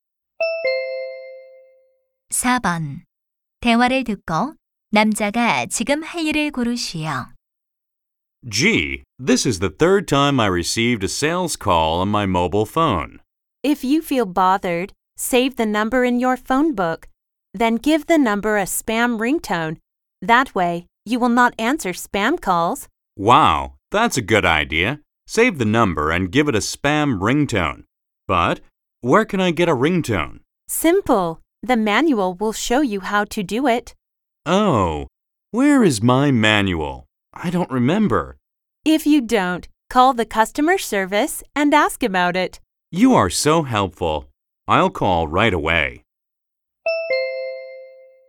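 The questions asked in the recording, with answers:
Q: 대화를 듣고 남자가 지금 할 일을 고르시오.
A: 고객 서비스 센터에 전화하기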